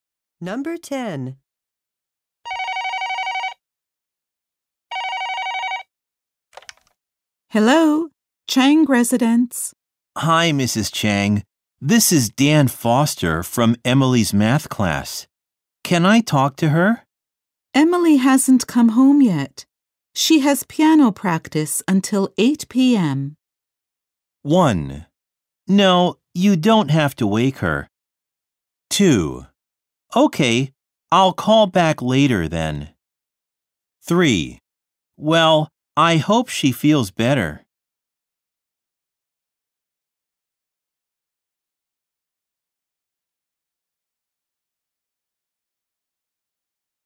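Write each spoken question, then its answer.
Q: She has piano practice until 8 p.m.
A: 2: Okay, I'll call back later then.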